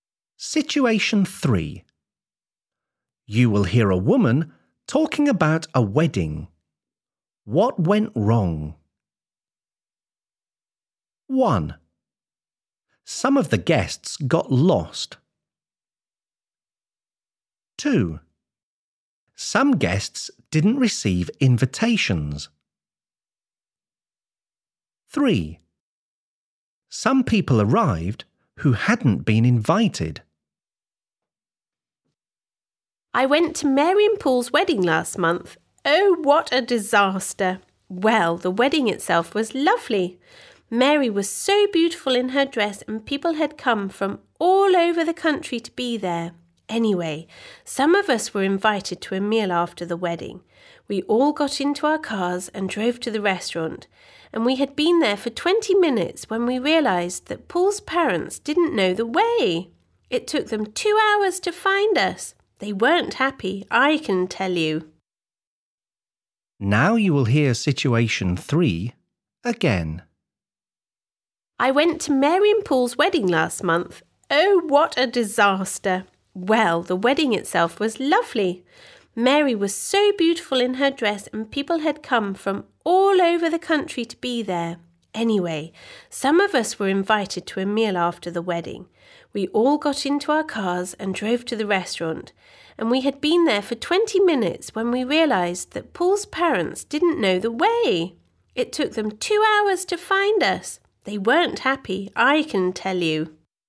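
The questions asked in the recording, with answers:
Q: What went wrong?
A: 1: Some of the guests got lost.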